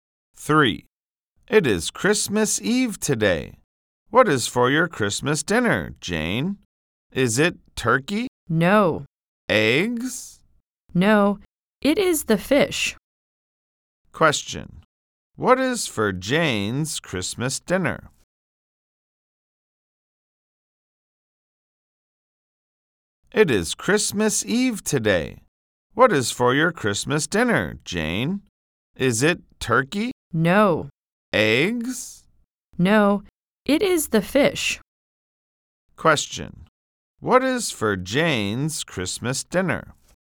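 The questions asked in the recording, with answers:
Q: Question. What is for Jane's Christmas dinner?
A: Fish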